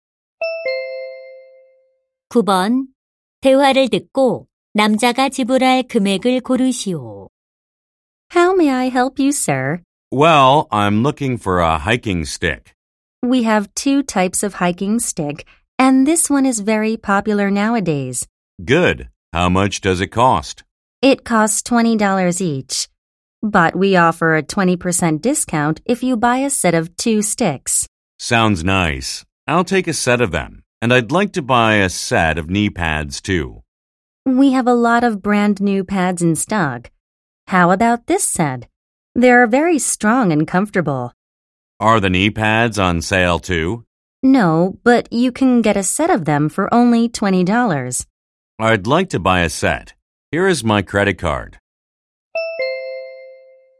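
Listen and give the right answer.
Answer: 52달러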